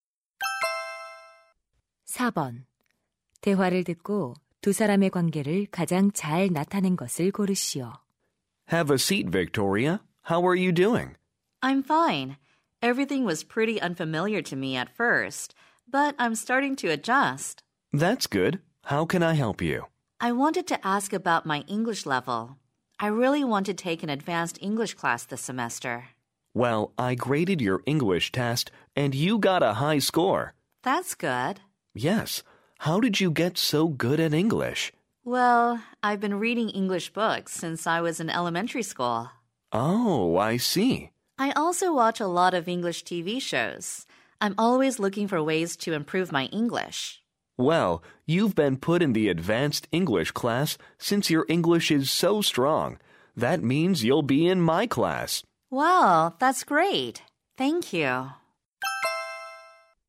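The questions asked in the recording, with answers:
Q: 대화를 듣고 두 사람의 관계를 가장 잘 나타낸 것을 고르시오.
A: 영어 교사 – 학생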